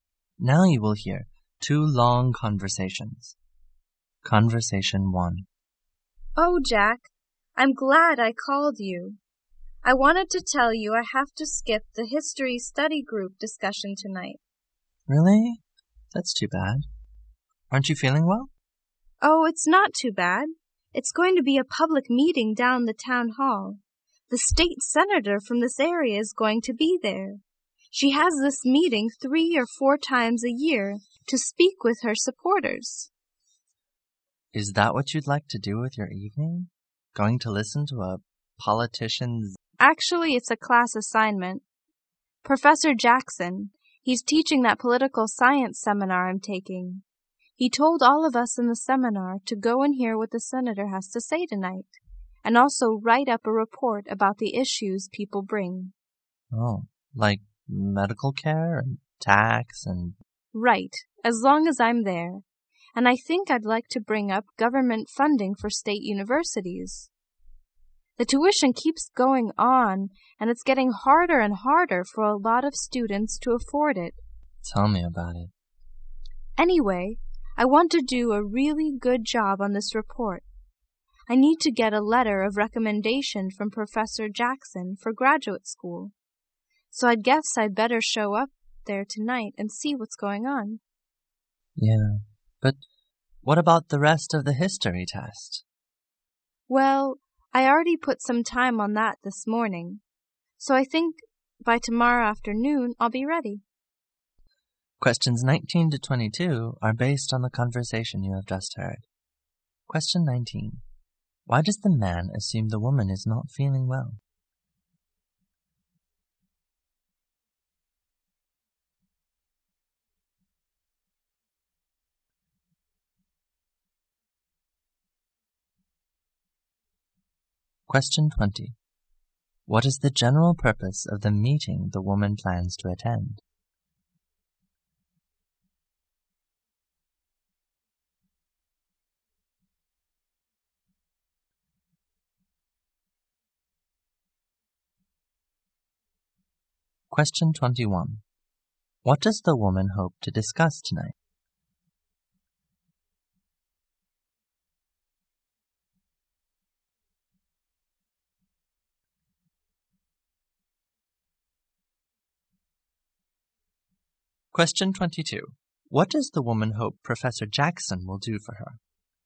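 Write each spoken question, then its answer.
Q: Why does the man assume the woman is not feeling well?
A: She says she will skip the study group tonight.

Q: What is the general purpose of the meeting the woman plans to attend?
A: For the state senator to speak with her supporters.

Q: What does the woman hope to discuss tonight?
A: Government funding for state universities.

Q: What does the woman hope Professor Jackson will do for her?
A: Write her a letter of recommendation for graduate school.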